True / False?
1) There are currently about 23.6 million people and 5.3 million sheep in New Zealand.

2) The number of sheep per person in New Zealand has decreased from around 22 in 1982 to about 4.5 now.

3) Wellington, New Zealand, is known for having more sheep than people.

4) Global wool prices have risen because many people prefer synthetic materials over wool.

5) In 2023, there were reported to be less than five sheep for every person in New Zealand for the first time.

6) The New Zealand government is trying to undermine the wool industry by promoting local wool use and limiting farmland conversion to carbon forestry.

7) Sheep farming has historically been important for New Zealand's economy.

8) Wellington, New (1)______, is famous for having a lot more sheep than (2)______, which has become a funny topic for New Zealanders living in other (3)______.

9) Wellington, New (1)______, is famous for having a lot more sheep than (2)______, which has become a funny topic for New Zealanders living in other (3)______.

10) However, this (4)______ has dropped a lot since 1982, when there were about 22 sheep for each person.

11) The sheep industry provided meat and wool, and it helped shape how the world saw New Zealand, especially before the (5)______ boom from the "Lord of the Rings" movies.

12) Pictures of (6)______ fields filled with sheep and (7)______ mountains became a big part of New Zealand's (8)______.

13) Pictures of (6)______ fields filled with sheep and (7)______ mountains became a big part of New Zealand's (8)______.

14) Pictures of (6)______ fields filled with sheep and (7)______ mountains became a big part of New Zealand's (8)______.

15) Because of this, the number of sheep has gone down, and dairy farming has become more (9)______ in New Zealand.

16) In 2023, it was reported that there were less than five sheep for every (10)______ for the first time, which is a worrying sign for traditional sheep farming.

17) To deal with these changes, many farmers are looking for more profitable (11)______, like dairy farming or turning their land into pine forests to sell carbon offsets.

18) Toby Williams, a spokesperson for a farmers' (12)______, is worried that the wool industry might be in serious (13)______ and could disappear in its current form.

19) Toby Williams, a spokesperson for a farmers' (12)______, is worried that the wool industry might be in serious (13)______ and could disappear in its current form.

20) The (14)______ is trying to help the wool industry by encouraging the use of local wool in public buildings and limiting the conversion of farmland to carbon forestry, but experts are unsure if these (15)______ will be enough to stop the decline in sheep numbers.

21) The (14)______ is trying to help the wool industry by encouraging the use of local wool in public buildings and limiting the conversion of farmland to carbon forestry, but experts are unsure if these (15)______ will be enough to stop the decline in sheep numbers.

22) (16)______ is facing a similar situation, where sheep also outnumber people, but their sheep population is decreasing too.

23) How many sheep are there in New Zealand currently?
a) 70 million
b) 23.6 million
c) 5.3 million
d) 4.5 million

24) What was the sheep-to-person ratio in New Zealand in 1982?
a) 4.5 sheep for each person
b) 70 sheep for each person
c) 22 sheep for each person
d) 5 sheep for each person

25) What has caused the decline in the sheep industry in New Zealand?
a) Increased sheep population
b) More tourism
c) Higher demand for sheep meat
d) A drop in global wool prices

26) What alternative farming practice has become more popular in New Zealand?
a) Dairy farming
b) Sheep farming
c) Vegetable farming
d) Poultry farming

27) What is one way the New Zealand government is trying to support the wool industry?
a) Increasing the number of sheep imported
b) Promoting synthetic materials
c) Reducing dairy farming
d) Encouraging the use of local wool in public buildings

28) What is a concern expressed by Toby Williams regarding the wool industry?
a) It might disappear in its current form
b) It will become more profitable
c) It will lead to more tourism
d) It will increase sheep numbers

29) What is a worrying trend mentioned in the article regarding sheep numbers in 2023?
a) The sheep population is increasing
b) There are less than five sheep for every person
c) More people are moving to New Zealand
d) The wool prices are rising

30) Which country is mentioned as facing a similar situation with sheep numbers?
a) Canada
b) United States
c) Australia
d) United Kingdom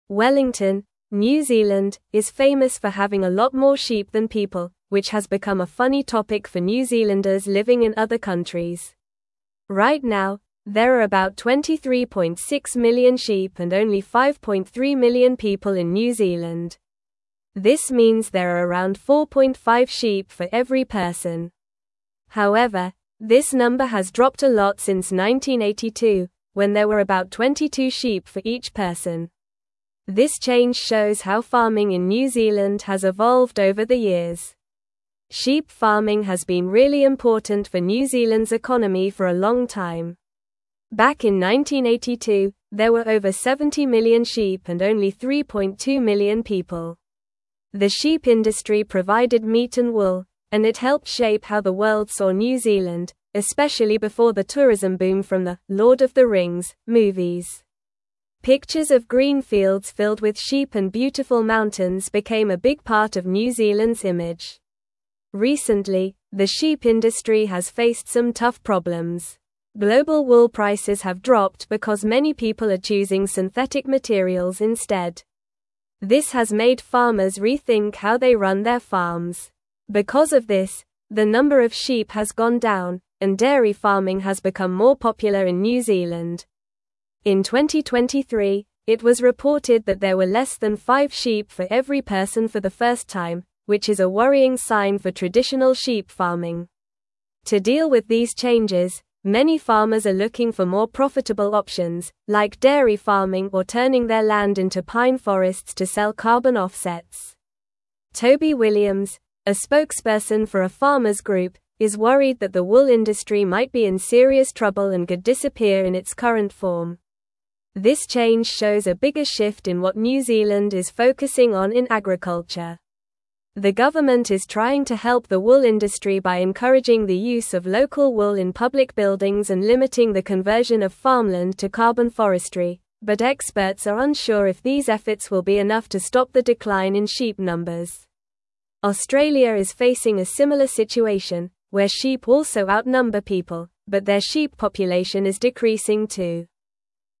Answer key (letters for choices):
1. False
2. True
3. True
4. False
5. True
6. False
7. True
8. people
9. countries
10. number
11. tourism
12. green
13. beautiful
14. image
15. popular
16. person
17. options
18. group
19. trouble
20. government
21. efforts
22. Australia
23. b
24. c
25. d
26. a
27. d
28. a
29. b
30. c

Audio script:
Wellington, New Zealand, is famous for having a lot more sheep than people, which has become a funny topic for New Zealanders living in other countries. Right now, there are about 23.6 million sheep and only 5.3 million people in New Zealand. This means there are around 4.5 sheep for every person. However, this number has dropped a lot since 1982, when there were about 22 sheep for each person. This change shows how farming in New Zealand has evolved over the years.
Sheep farming has been really important for New Zealand's economy for a long time. Back in 1982, there were over 70 million sheep and only 3.2 million people. The sheep industry provided meat and wool, and it helped shape how the world saw New Zealand, especially before the tourism boom from the "Lord of the Rings" movies. Pictures of green fields filled with sheep and beautiful mountains became a big part of New Zealand's image.
Recently, the sheep industry has faced some tough problems. Global wool prices have dropped because many people are choosing synthetic materials instead. This has made farmers rethink how they run their farms. Because of this, the number of sheep has gone down, and dairy farming has become more popular in New Zealand. In 2023, it was reported that there were less than five sheep for every person for the first time, which is a worrying sign for traditional sheep farming.
To deal with these changes, many farmers are looking for more profitable options, like dairy farming or turning their land into pine forests to sell carbon offsets. Toby Williams, a spokesperson for a farmers' group, is worried that the wool industry might be in serious trouble and could disappear in its current form. This change shows a bigger shift in what New Zealand is focusing on in agriculture. The government is trying to help the wool industry by encouraging the use of local wool in public buildings and limiting the conversion of farmland to carbon forestry, but experts are unsure if these efforts will be enough to stop the decline in sheep numbers. Australia is facing a similar situation, where sheep also outnumber people, but their sheep population is decreasing too.

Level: Level 3